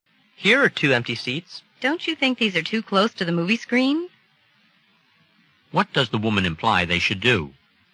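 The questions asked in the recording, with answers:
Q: What does the woman imply they should do?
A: Look for seats farther from the screen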